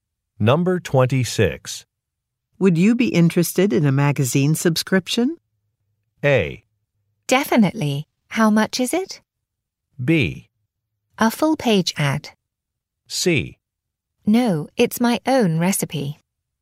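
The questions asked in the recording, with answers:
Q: Would you be interested in a magazine subscription?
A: A: Definitely. How much is it?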